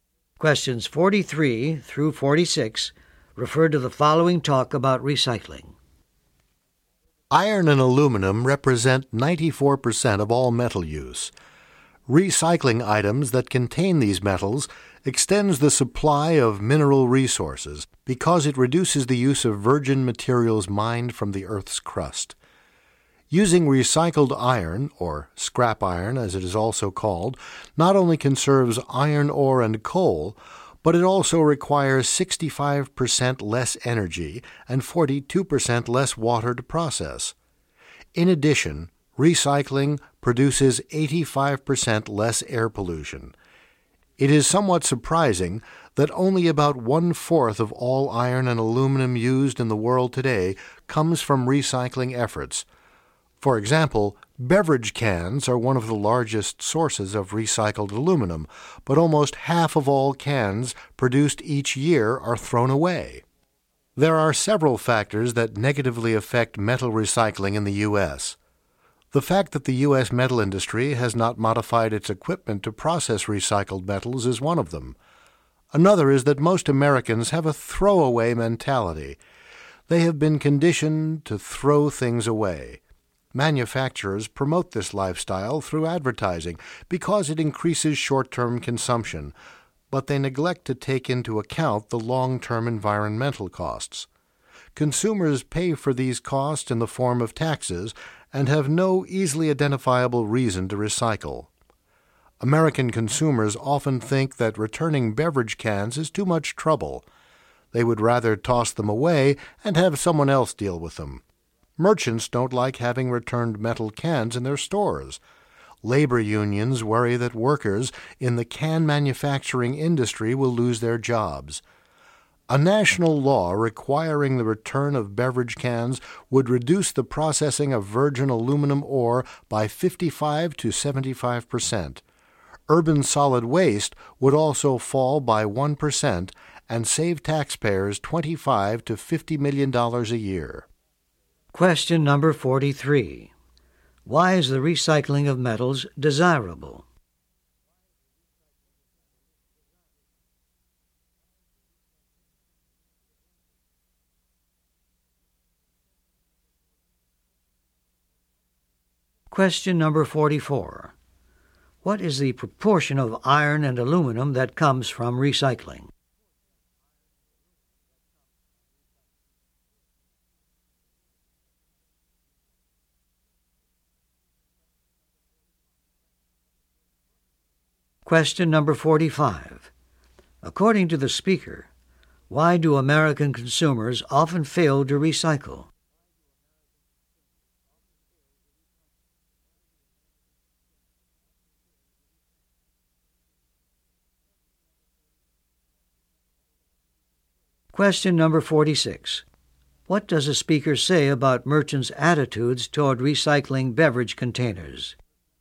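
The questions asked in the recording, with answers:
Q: Why is the recycling of metals desirable?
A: It extends the supply of mineral resources by reducing the use of virgin materials

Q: What is the proportion of iron and aluminum that comes from recycling?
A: About one quarter

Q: What does a speaker say about merchants' attitudes toward recycling beverage containers?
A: They don't like having returned cans in their stores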